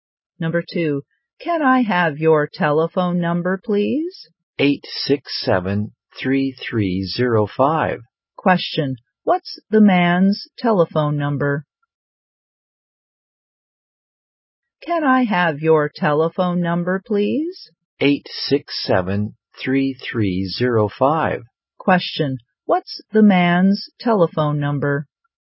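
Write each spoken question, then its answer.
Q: what's the man's telephone number?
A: 867-3305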